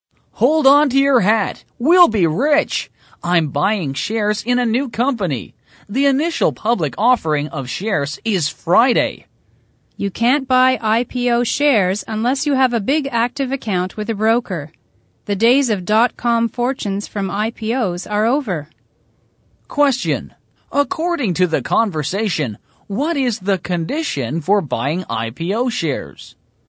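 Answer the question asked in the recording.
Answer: Having a big active account with a broker.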